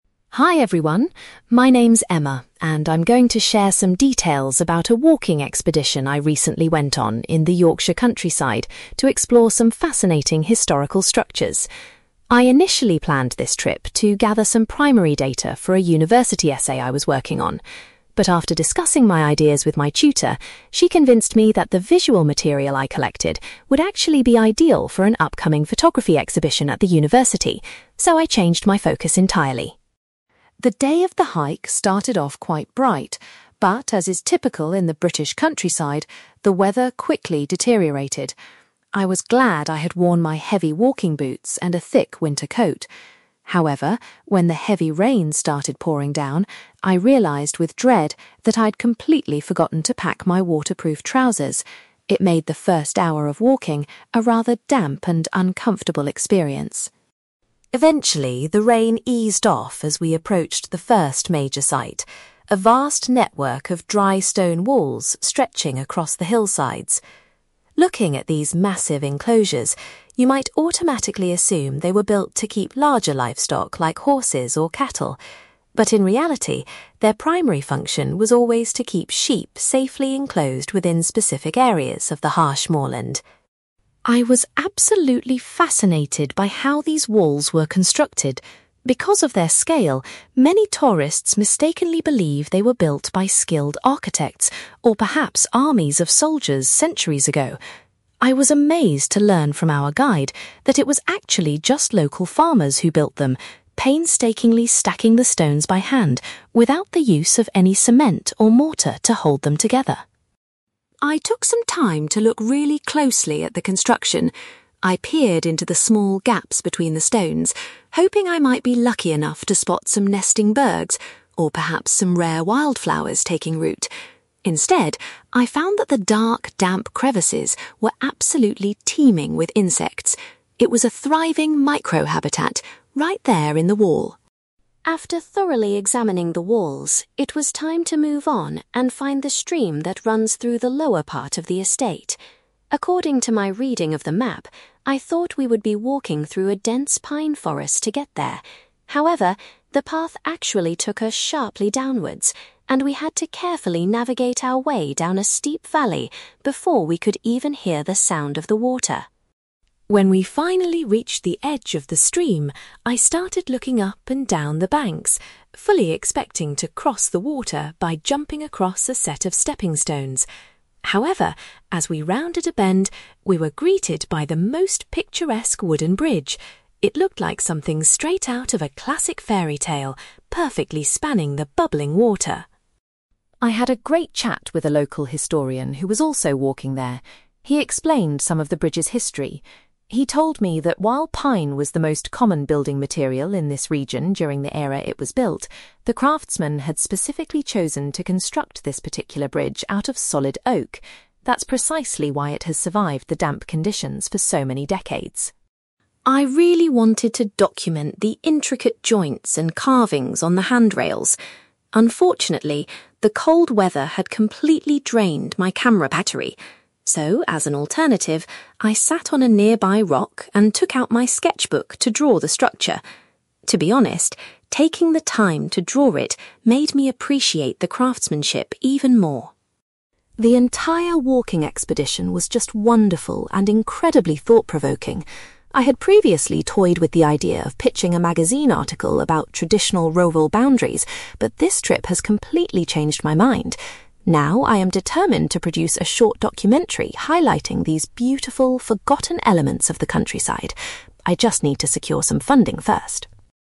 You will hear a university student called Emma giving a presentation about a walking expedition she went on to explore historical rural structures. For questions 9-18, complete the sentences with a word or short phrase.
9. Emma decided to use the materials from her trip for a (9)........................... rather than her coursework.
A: photography exhibition

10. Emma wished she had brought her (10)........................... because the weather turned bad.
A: waterproof trousers

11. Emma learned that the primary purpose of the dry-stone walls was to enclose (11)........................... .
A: sheep

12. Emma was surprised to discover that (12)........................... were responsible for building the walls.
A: local farmers

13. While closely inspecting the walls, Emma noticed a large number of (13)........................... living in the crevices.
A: insects

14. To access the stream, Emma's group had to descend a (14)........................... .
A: steep valley

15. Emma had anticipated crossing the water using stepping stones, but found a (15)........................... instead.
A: wooden bridge

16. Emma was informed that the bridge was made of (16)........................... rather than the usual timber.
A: solid oak

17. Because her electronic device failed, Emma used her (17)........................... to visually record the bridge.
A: sketchbook

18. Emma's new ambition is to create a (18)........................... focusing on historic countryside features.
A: documentary

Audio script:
Emma: Hi everyone. My name's Emma, and I'm going to share some details about a walking expedition I recently went on in the Yorkshire countryside to explore some fascinating historical structures. I initially planned this trip to gather some primary data for a university essay I was working on. But after discussing my ideas with my tutor, she convinced me that the visual material I collected would actually be ideal for an upcoming photography exhibition at the university, so I changed my focus entirely.
The day of the hike started off quite bright, but as is typical in the British countryside, the weather quickly deteriorated. I was glad I had worn my heavy walking boots and a thick winter coat. However, when the heavy rain started pouring down, I realised with dread that I'd completely forgotten to pack my waterproof trousers. It made the first hour of walking a rather damp and uncomfortable experience!
Eventually, the rain eased off as we approached the first major site: a vast network of dry-stone walls stretching across the hillsides. Looking at these massive enclosures, you might automatically assume they were built to keep larger livestock like horses or cattle. But in reality, their primary function was always to keep sheep safely enclosed within specific areas of the harsh moorland.
I was absolutely fascinated by how these walls were constructed. Because of their scale, many tourists mistakenly believe they were built by skilled architects or perhaps armies of soldiers centuries ago. I was amazed to learn from our guide that it was actually just local farmers who built them, painstakingly stacking the stones by hand without the use of any cement or mortar to hold them together.
I took some time to look really closely at the construction. I peered into the small gaps between the stones, hoping I might be lucky enough to spot some nesting birds or perhaps some rare wild flowers taking root. Instead, I found that the dark, damp crevices were absolutely teeming with insects. It was a thriving micro-habitat right there in the wall.
After thoroughly examining the walls, it was time to move on and find the stream that runs through the lower part of the estate. According to my reading of the map, I thought we would be walking through a dense pine forest to get there. However, the path actually took us sharply downwards, and we had to carefully navigate our way down a steep valley before we could even hear the sound of the water.
When we finally reached the edge of the stream, I started looking up and down the banks, fully expecting to cross the water by jumping across a set of stepping stones. However, as we rounded a bend, we were greeted by the most picturesque wooden bridge. It looked like something straight out of a classic fairy tale, perfectly spanning the bubbling water.
I had a great chat with a local historian who was also walking there. He explained some of the bridge's history. He told me that while pine was the most common building material in this region during the era it was built, the craftsmen had specifically chosen to construct this particular bridge out of solid oak. That's precisely why it has survived the damp conditions for so many decades.
I really wanted to document the intricate joints and carvings on the handrails. Unfortunately, the cold weather had completely drained my camera battery. So, as an alternative, I sat on a nearby rock and took out my sketchbook to draw the structure. To be honest, taking the time to draw it made me appreciate the craftsmanship even more.
The entire walking expedition was just wonderful and incredibly thought-provoking. I had previously toyed with the idea of pitching a magazine article about traditional rural boundaries, but this trip has completely changed my mind. Now, I am determined to produce a short documentary highlighting these beautiful, forgotten elements of the countryside. I just need to secure some funding first!

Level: B2